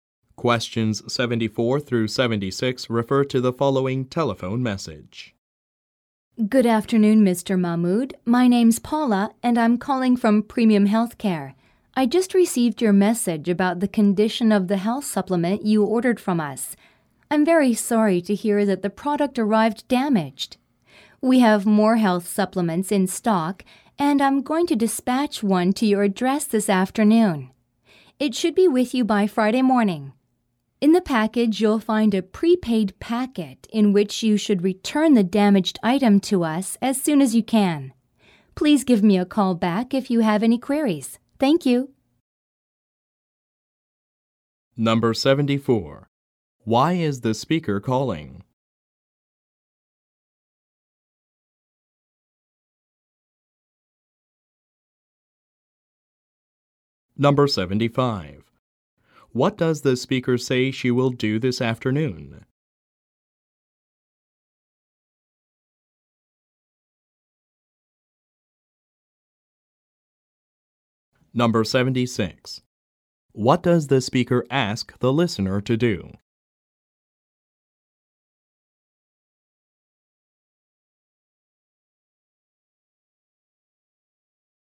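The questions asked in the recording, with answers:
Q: Why is the speaker calling?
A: To respond to a complaint about a damaged product

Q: What does the speaker say she will do this afternoon?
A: Send a replacement health supplement

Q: What does the speaker ask the listener to do?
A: Return the damaged item in the prepaid packet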